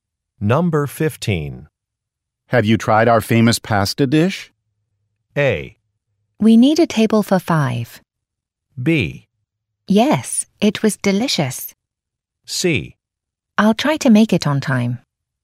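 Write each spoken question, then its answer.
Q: Have you tried our famous pasta dish?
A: B: Yes, it was delicious.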